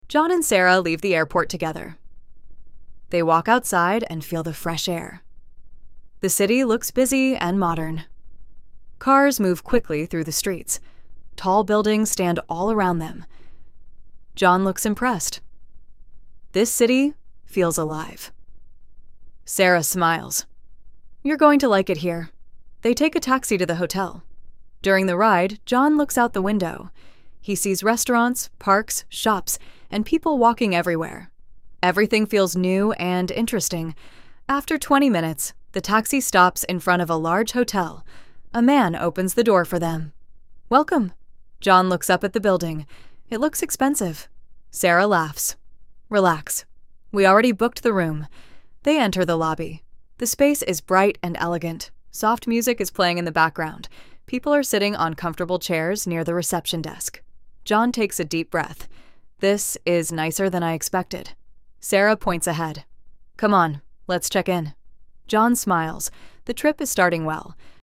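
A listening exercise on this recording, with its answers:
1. How does the city look?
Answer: Busy and modern.

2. What do they take to the hotel?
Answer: A taxi.

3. How long is the ride?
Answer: Twenty minutes.

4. What does John think of the hotel?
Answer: It looks expensive and is nicer than he expected.

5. How does the trip feel now?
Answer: It is starting well.

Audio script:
John and Sarah leave the airport together.
They walk outside and feel the fresh air.
The city looks busy and modern.
Cars move quickly through the streets.
Tall buildings stand all around them.
John looks impressed.
"This city feels alive," he says.
Sarah smiles.
"You're going to like it here."
They take a taxi to the hotel.
During the ride, John looks out the window.
He sees restaurants, parks, shops, and people walking everywhere.
Everything feels new and interesting.
After twenty minutes, the taxi stops in front of a large hotel.
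A man opens the door for them.
John looks up at the building.
"It looks expensive," he says quietly.
Sarah laughs.
"Relax. We already booked the room."
They enter the lobby.
The space is bright and elegant.
Soft music is playing in the background.
People are sitting on comfortable chairs near the reception desk.
John takes a deep breath.
"This is nicer than I expected," he says.
Sarah points ahead.
"Come on. Let's check in."
John smiles.
The trip is starting well.

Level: Inglês Básico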